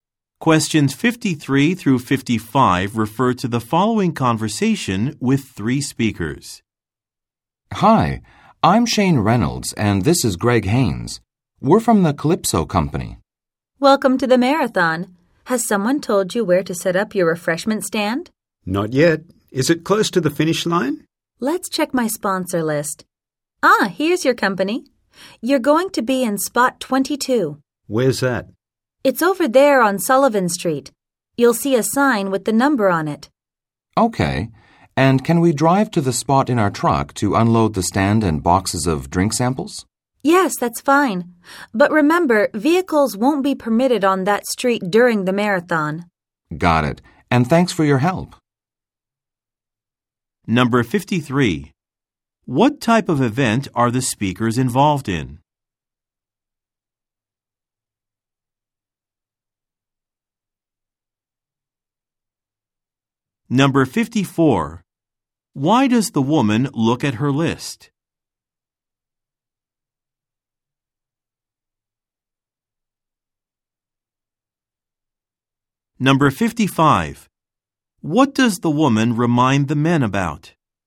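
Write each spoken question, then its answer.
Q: What type of event are the speakers involved in?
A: A marathon

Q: Why does the woman look at her list?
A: To find where the men's refreshment stand will be set up

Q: What does the woman remind the men about?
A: Vehicles won't be permitted on the street during the marathon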